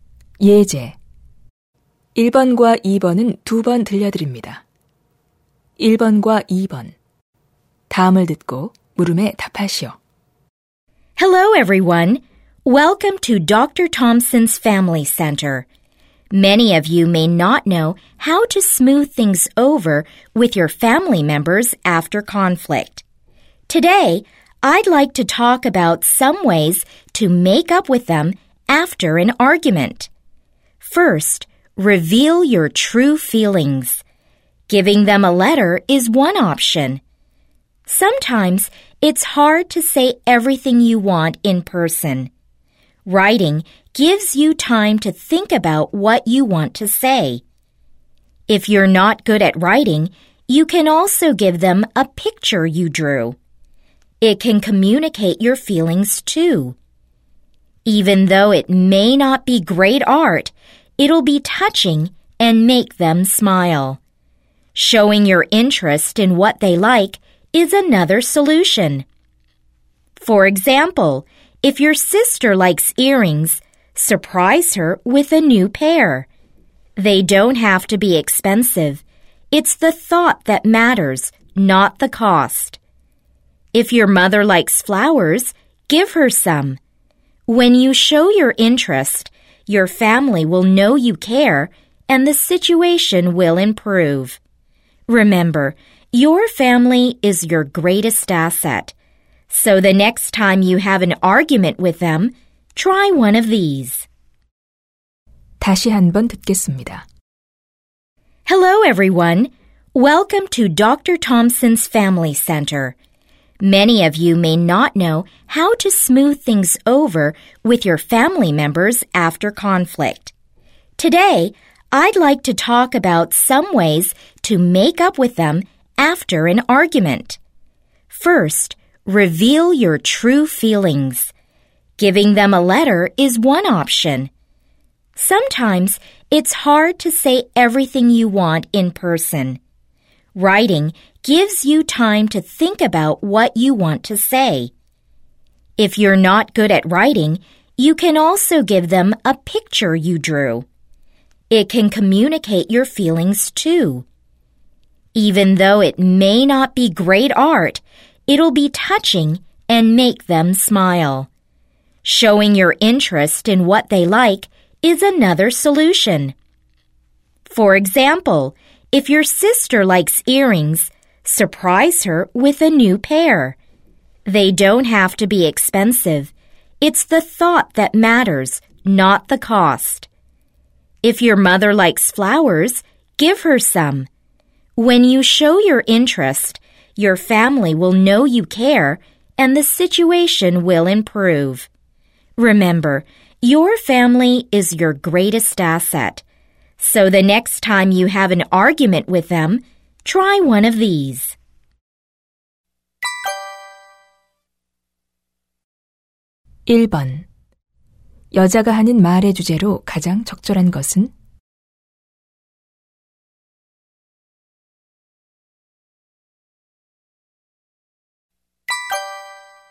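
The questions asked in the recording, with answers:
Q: 1번 여자가 하는 말의 주제로 가장 적절한 것은?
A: 말다툼 후 가족과 화해하는 방법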